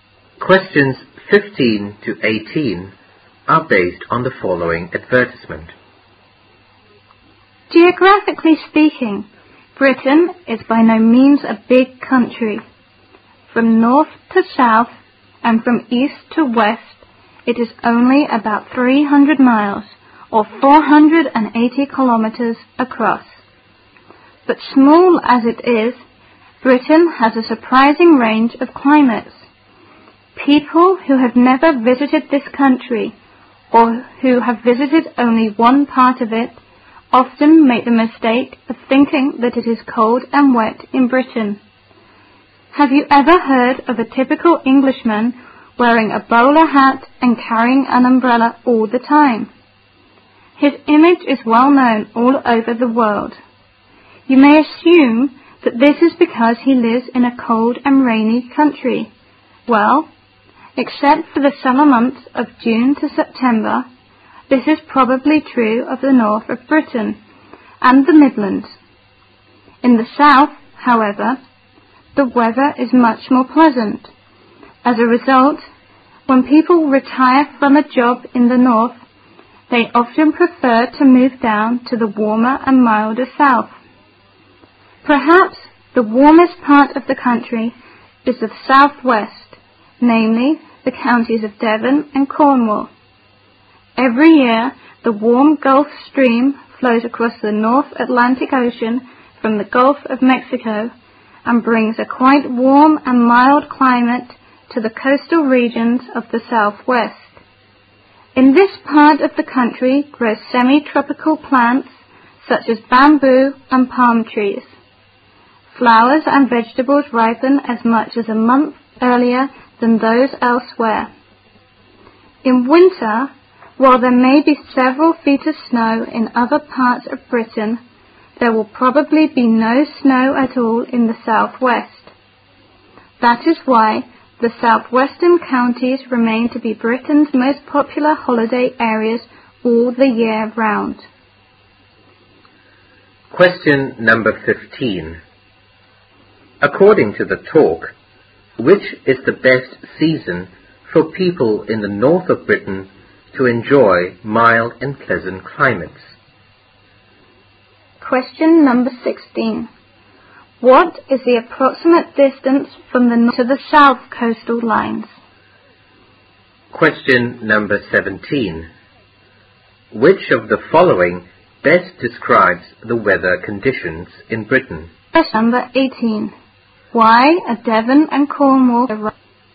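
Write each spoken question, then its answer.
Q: According to the talk, which is the best season for people in the north of Britain to enjoy mild and pleasant climates?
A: Summer (June to September)

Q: What is the approximate distance from the north to the south coastal lines?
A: About 300 miles (480 kilometers)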